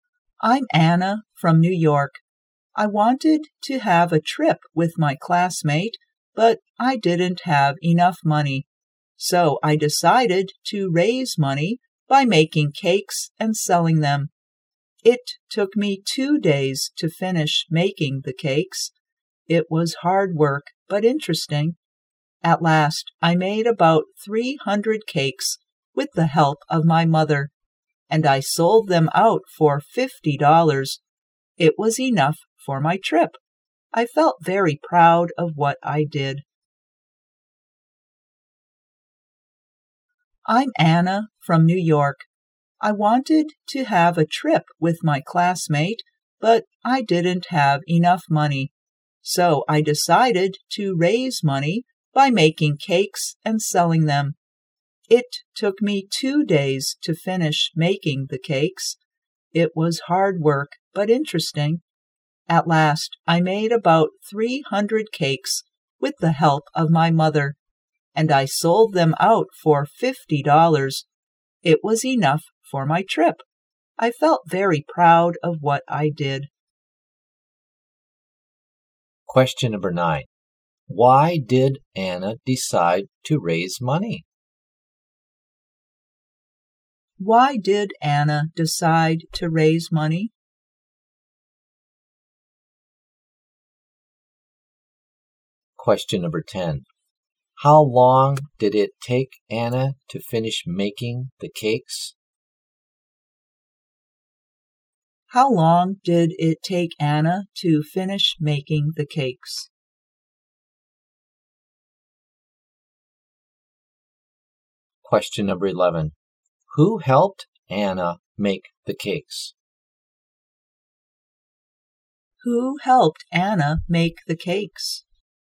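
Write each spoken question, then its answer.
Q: Why did Anna decide to raise money?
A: She wanted to have a trip but didn't have enough money

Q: How long did it take Anna to finish making the cakes?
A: 2 days

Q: Who helped Anna make the cakes?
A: Her mother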